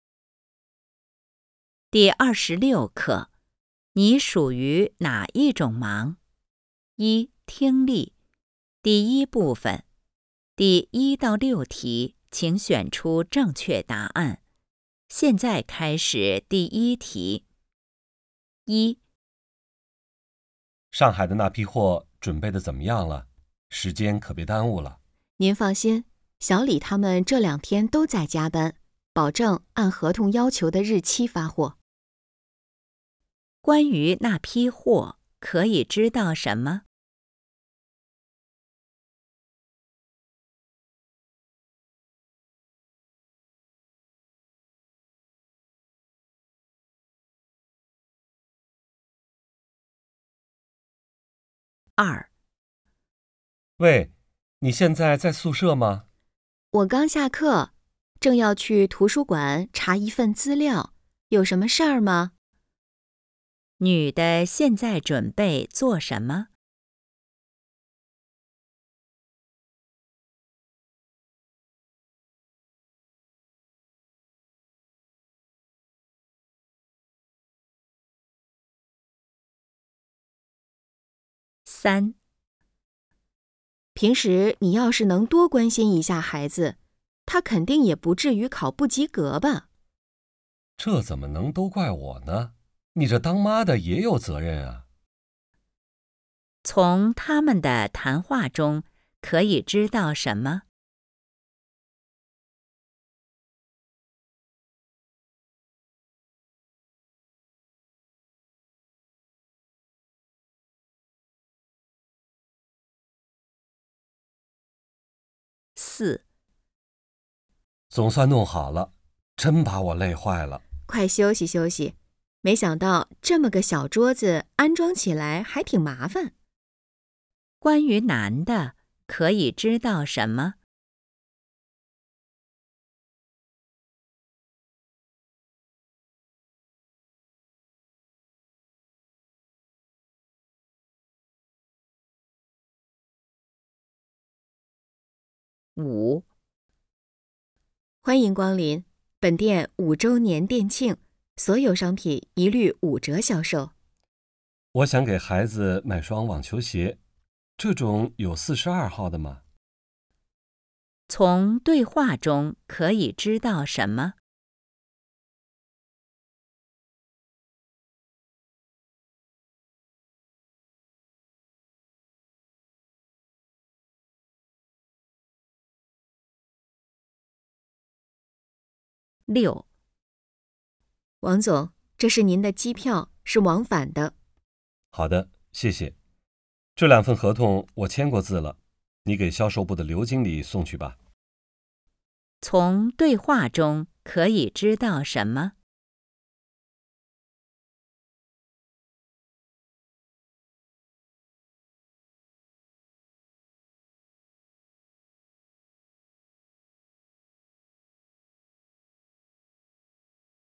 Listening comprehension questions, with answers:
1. 关于那批货,可以知道什么?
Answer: 能按时发货

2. 女的现在准备做什么?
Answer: 去查找资料

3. 从他们的谈话中,可以知道什么?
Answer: 孩子成绩不好

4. 关于男的,可以知道什么?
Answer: 干活儿累了

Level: HSK 5